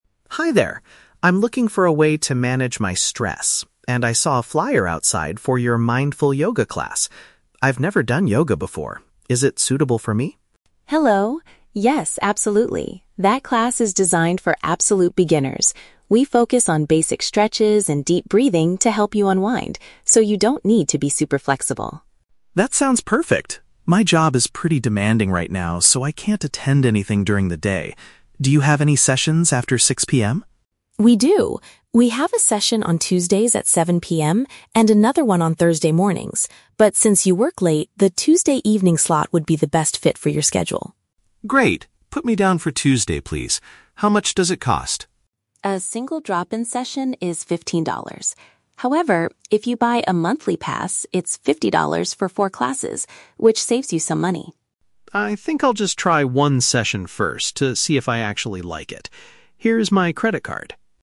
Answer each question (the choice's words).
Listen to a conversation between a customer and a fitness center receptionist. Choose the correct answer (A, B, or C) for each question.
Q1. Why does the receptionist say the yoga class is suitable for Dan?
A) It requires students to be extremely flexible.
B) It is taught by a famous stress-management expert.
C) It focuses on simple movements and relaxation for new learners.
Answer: It focuses on simple movements and relaxation for new learners.

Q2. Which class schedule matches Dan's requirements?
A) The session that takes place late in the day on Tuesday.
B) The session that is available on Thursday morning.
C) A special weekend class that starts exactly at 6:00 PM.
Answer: The session that takes place late in the day on Tuesday.

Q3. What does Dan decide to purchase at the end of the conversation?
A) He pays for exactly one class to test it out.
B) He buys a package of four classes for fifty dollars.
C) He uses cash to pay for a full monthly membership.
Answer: He pays for exactly one class to test it out.

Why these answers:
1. Chloe says the class is for "absolute beginners" and focuses on "basic stretches and deep breathing to help you unwind". This is paraphrased as "simple movements and relaxation for new learners". The Trap (A): The word "flexible" is mentioned, but Chloe explicitly tells Dan that he does not need to be super flexible (Mentioned but rejected). Plausible Trap (B): Having a famous expert teach the class is a plausible reason for it to be good, but it is never mentioned in the audio.
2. Dan needs a class "after 6:00 PM". Chloe suggests "Tuesdays at 7:00 PM" (the Tuesday evening slot). This is paraphrased as "late in the day on Tuesday". The Trap (B): A "Thursday morning" class is mentioned by Chloe, but it does not match Dan's schedule because he works during the day (Mentioned but wrong context). The Trap (C): The time "6:00 PM" is mentioned in the audio, but it is just Dan's boundary for when he finishes work. There is no weekend class mentioned.
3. Dan says, "I'll just try one session first to see if I actually like it". This perfectly matches the statement that he "pays for exactly one class to test it out". The Trap (B): The receptionist offers him a "monthly pass" which is "$50 for four classes", but Dan politely rejects this option for now (Mentioned but rejected). The Trap (C): He hands her a "credit card" to pay, not cash (Mentioned but wrong context).

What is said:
Dan: Hi there. I'm looking for a way to manage my stress, and I saw a flyer outside for your "Mindful Yoga" class. I've never done yoga before. Is it suitable for me?
Chloe: Hello! Yes, absolutely. That class is designed for absolute beginners. We focus on basic stretches and deep breathing to help you unwind, so you don't need to be super flexible.
Dan: That sounds perfect. My job is pretty demanding right now, so I can't attend anything during the day. Do you have any sessions after 6:00 PM?
Chloe: We do. We have a session on Tuesdays at 7:00 PM, and another one on Thursday mornings. But since you work late, the Tuesday evening slot would be the best fit for your schedule.
Dan: Great. Put me down for Tuesday, please. How much does it cost?
Chloe: A single drop-in session is $15. However, if you buy a monthly pass, it's $50 for four classes, which saves you some money.
Dan: I think I'll just try one session first to see if I actually like it.